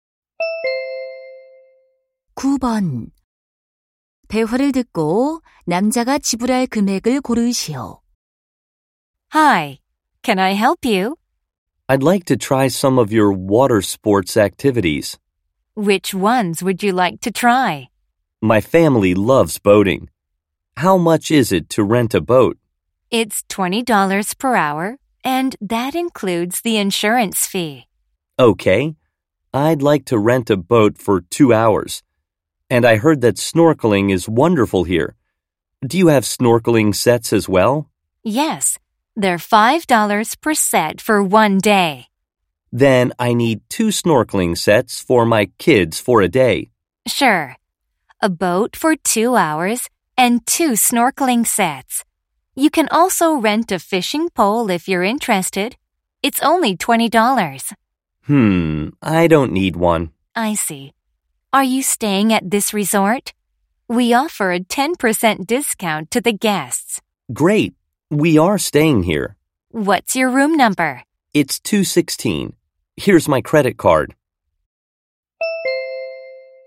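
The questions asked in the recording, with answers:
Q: 대화를 듣고 남자가 지불할 금액을 고르시오.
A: $45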